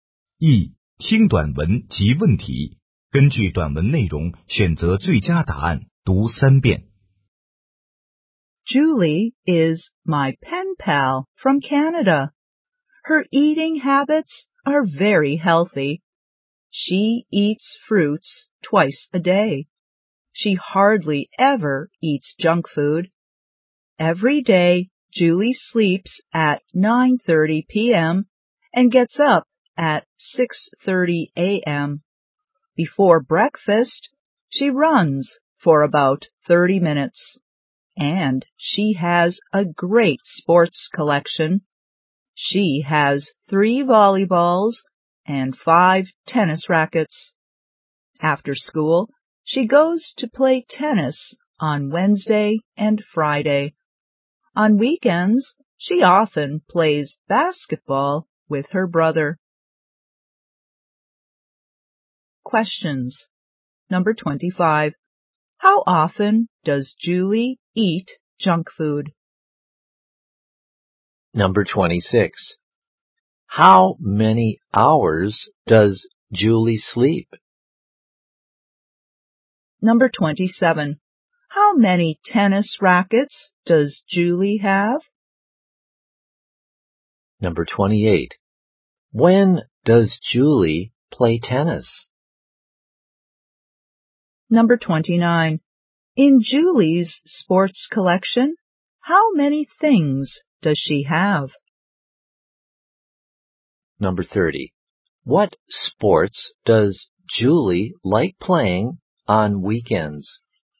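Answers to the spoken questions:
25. Hardly ever
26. Nine hours
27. Five
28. On Wednesday and Friday after school
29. Eight
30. Basketball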